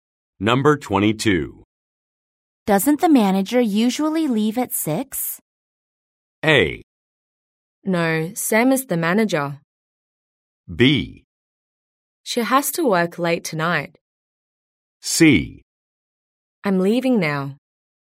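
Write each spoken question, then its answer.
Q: Doesn't the manager usually leave at 6?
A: B: She has to work late tonight.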